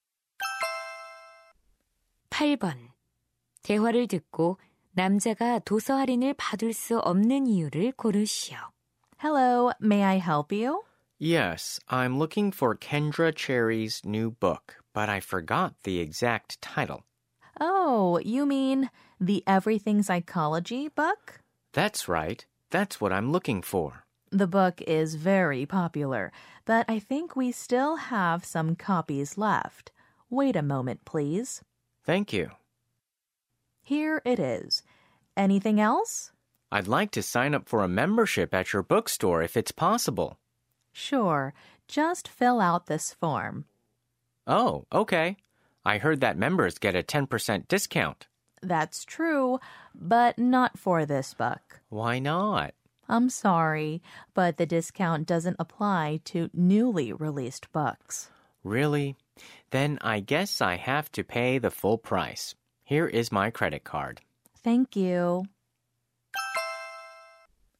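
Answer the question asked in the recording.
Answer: 신간 도서에는 할인이 적용되지 않아서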